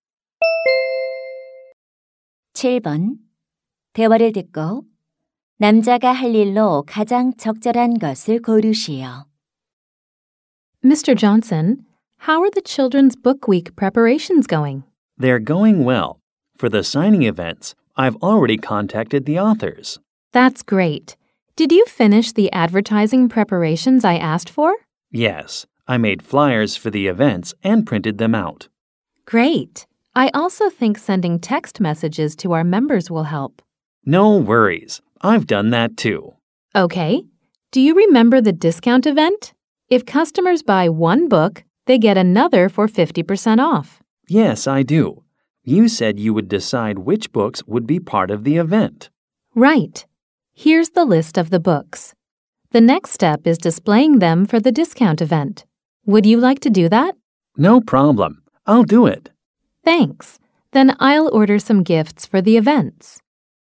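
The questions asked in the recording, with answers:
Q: 대화를 듣고 남자가 할 일로 가장 적절한 것을 고르시오.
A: 할인 행사용 도서 진열하기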